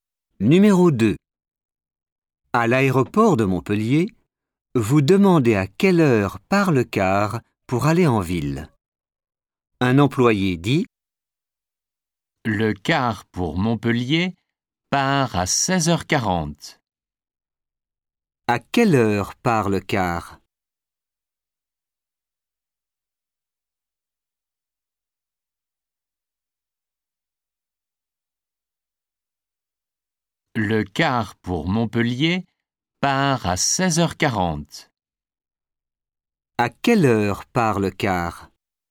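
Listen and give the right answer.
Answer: à 16h40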